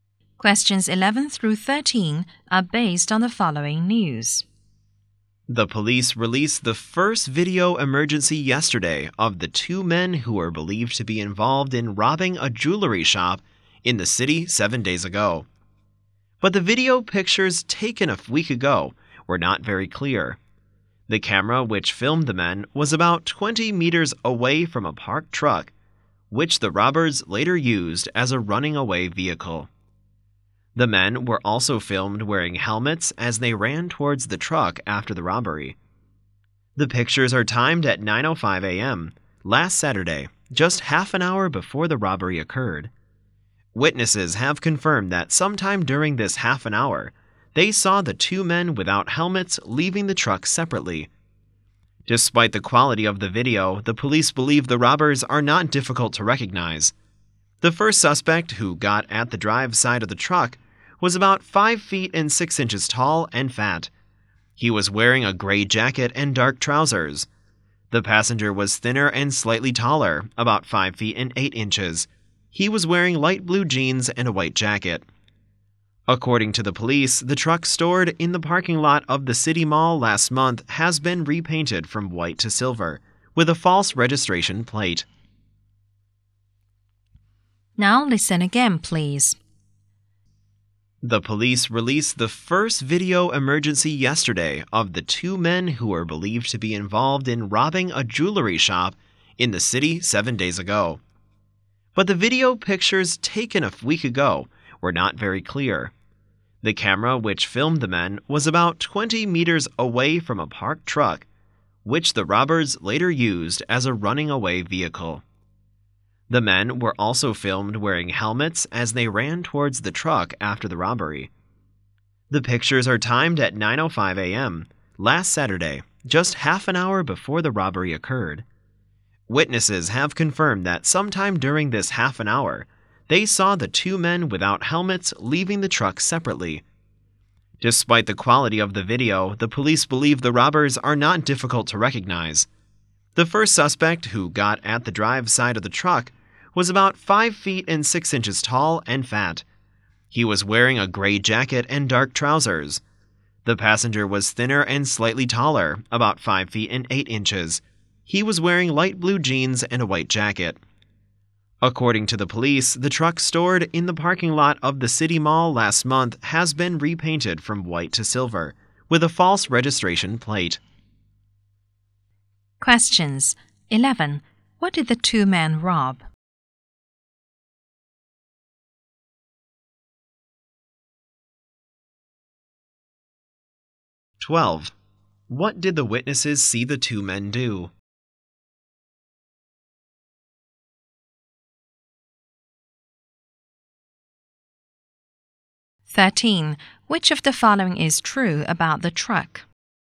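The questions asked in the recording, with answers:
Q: What did the two men rob?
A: A jewelry shop

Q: What did the witnesses see the two men do?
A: Leave the truck separately without helmets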